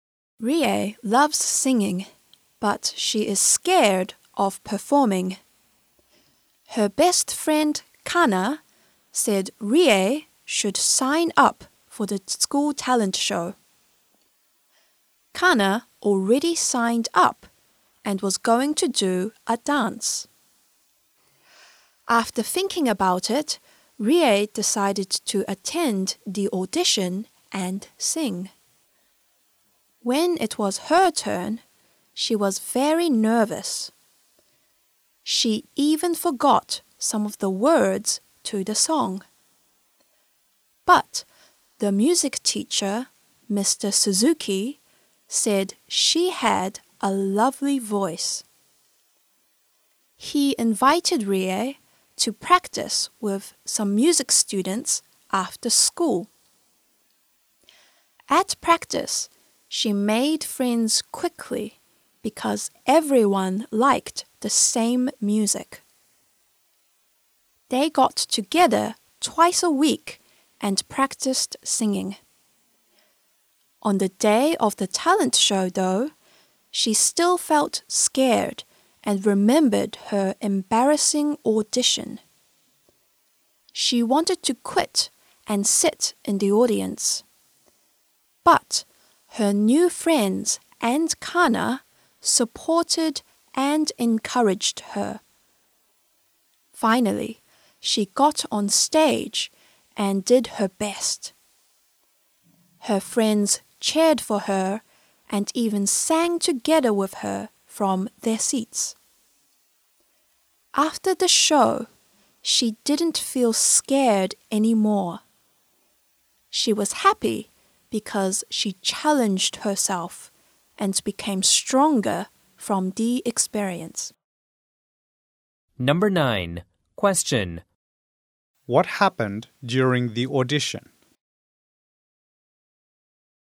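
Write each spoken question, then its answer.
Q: What happened during the audition?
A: Rie was nervous and forgot some of the words to the song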